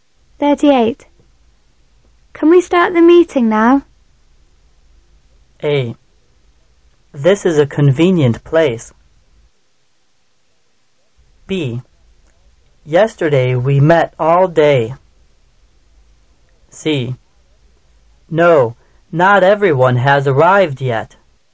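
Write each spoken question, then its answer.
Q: Can we start the meeting now?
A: C: No, not everyone has arrived yet.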